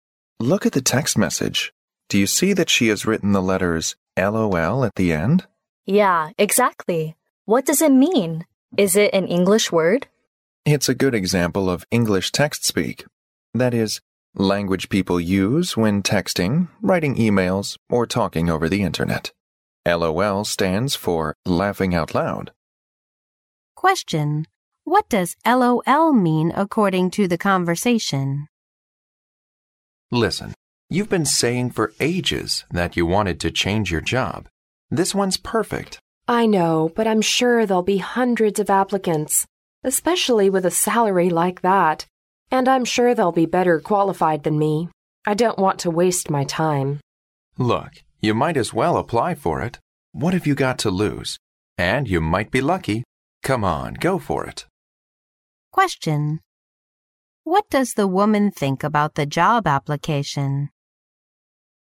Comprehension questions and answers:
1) What does LOL mean according to the conversation?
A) It is a newly invented word with obscure meaning.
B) It is a private text message information code.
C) It is an expression used in text messages only.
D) It is an acronym to express people's happy mood.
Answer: D) It is an acronym to express people's happy mood.

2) What does the woman think about the job application?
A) She is not quite confident about it.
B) She has got better qualifications.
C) She might be lucky to succeed.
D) She is better than other applicants.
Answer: A) She is not quite confident about it.

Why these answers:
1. 对话中男士向对方问到LOL是什么意思时,女士指出这是text speak的典型代表,即人们在发短信、写邮件和在网上聊天时会用到的语言,并解释说"LOL stands for 'laughing out loud' ",即代表开怀大笑。因此选D。
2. 男士鼓励女士去应聘,但是女士觉得自己能力不够,说明女士不够自信,因此选A项。

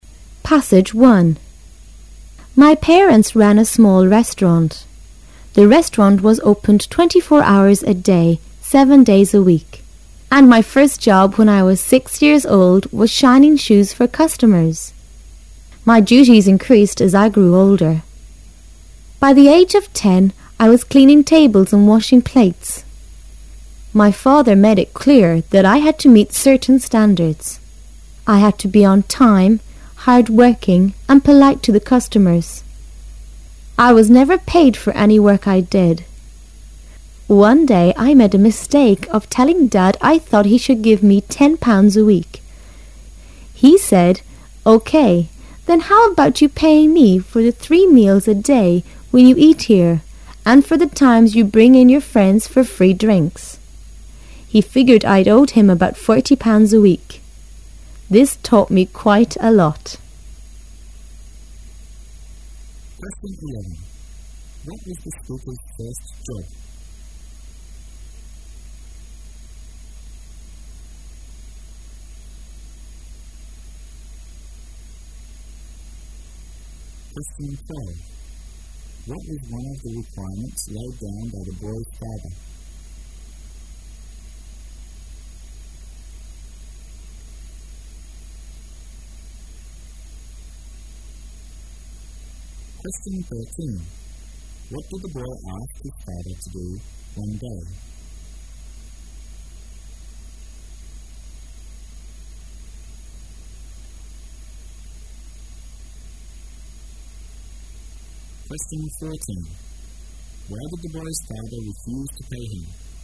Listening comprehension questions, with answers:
Why did the boy's father refuse to pay him?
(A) Because the boy was not a full-time worker.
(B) Because the boy had made some mistakes.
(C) Because he thought the boy had failed to meet his requirements.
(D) Because he thought it was his son who should pay him.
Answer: (D) Because he thought it was his son who should pay him.

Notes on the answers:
他父亲让他付一日三餐及带朋友来喝饮料的费用,算下来"I owed him about 40 pounds a week."父亲认为儿子欠他的,故选D。

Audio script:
[解析] 11-14 My parents ran a small restaurant. The restaurant was opened 24 hours a day, seven days a week. And my first job when 1 was six years old was shining shoes for customers. My duties increased as I grew older. By age of ten I was cleaning tables and washing plates. My father made it clear that I had to meet certain standards. I had to be on time, hard-working and polite to the customers. I was never paid for any work I did. One day I made a mistake of telling Dad I thought he should give me 10 pounds a week. He said, "OK. then how about you paying me for the three meals a day when you eat here and for the times you bring in your friends for free drinks?" He figured I owed him about 40 pounds a week. This taught me quite a lot. What was the speaker's first job?

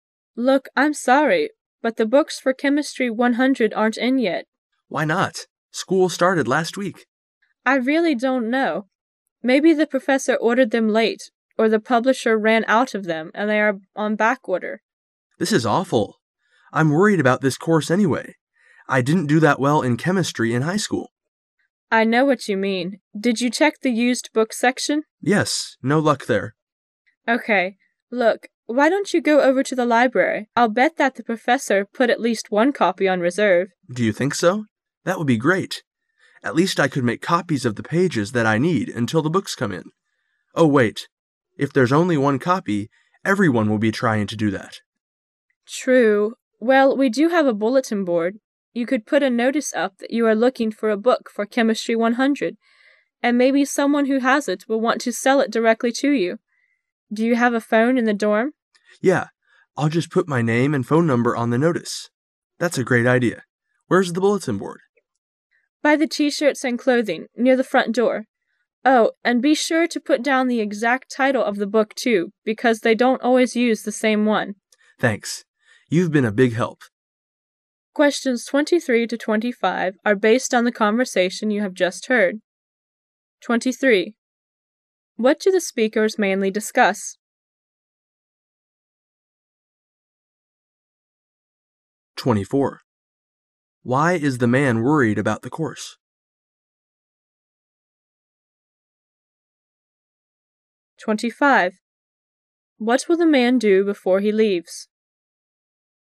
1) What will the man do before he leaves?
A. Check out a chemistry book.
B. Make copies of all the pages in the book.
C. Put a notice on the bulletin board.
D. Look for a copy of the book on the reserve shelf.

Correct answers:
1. C. Put a notice on the bulletin board.

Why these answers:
[解题思路] 本题是推理题。 [详细解答] 首先要听明白大致内容,然后做出推理。会话中提到" I'll just put my name and phone number on the notice"

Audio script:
[解析] 23-25 W: Look, I'm sorry, but the books for Chem. 100 aren't in yet. M: Why not? School started last week. W: I really don't know. Maybe the professor ordered them late, or the publisher ran out of then and they are on back order. M: This is awful. I' m worried about this course anyway. I didn't do that well in chemistry in high school. W: I know what you mean. Did you check the used book section? M: Yes. No luck there. W: Okay. Look, why don't you go over to the library? I'll bet that the professor put at least one copy on reserve. M: Do you think so? That would be great. At least I could make copies of the pages that I need until the books come in. Oh, wait. If there's only one copy, everyone will be trying to do that. W: True. Well, we do have a bulletin board. You could put a notice up that you are looking for a book for Chemistry 100, and maybe someone who has it will want so sell it directly to you. Do you have a phone in the dorm? M: Yeah. I'll just put my name and phone number on the notice. That's a great idea! Where's the bulletin board? W: By the T - shirts and clothing near the front door. Oh, and be sure to put down the exact title of the book, too, because they don't always use the same one. M: Thanks. You've been a big help. 23.What do the speakers mainly discuss?

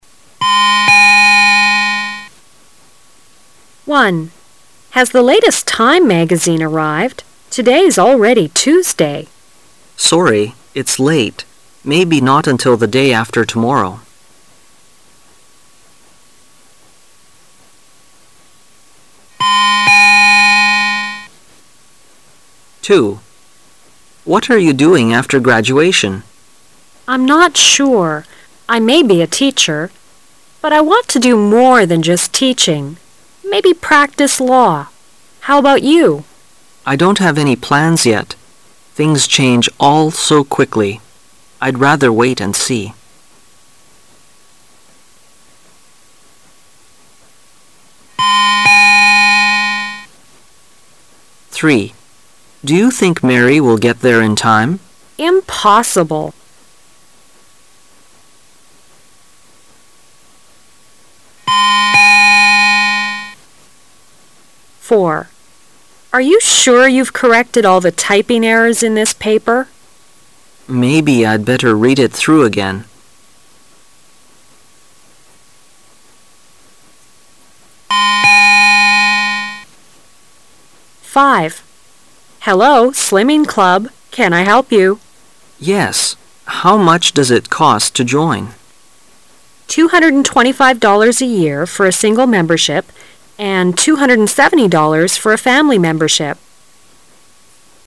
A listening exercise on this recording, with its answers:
Part A You will hear 10 short dialogues. For each dialogue, there is one question and four possible answers. Choose the correct answer -- A, B, C or D, and mark it in your test booklet. You will have 15 seconds to answer the question and you will hear each dialogue ONLY ONCE.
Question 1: On what day of the week will the magazine arrive?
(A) Monday.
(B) Tuesday.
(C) Wednesday.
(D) Thursday.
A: (D) Thursday.

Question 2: What is the man probably going to do after graduation?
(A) He will become a teacher.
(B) He will become a lawyer.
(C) He will try a lot of jobs.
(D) He has not decided yet.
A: (D) He has not decided yet.

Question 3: What does the woman mean?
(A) Mary doesn't know the way.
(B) Mary will be late.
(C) Mary is too far away.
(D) She'll send Mary away.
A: (B) Mary will be late.

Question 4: What's the man going to do?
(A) Leave the errors in the paper.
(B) Let the woman use the typewriter.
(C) Read the newspapers again.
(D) Check the paper for mistakes.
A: (D) Check the paper for mistakes.

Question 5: How much will it cost the man and one of his friends to join the Club?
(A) $ 225.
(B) $ 270.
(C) $ 450.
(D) $ 495.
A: (C) $ 450.

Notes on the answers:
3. M: Do you think Mary will get there in time? W: Impossible !
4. W: Arc you sure you've corrected all the typing errors in this paper? M: Maybe I'd better read it through again.
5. W: Hello. Slimming Club. Can I help you? M: Yes. How much does it cost to join? W: $ 1 225 a year for a single membership, and $ 1 270 for a family membership.

